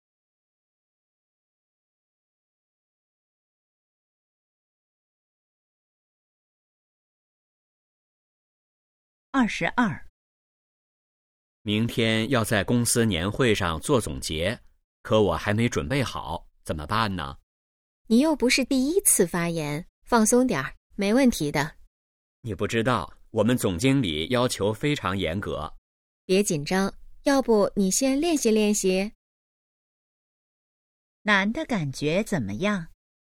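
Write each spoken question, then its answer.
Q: 男的感觉怎么样?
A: 紧张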